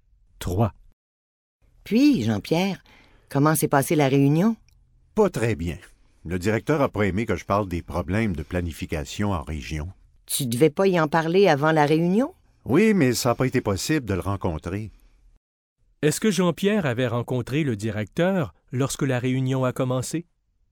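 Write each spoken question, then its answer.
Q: Est-ce que Jean-Pierre avait rencontré le directeur lorsque la réunion a commencé?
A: Non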